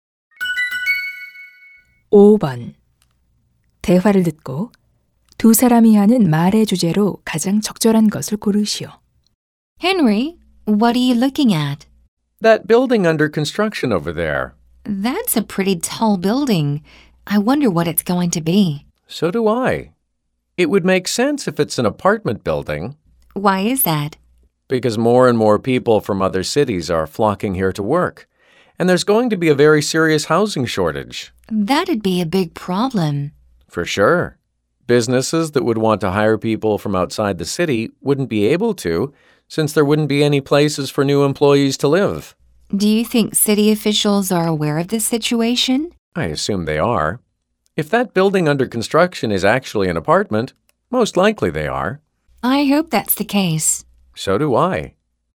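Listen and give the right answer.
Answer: 도시의 심각한 주택 부족 문제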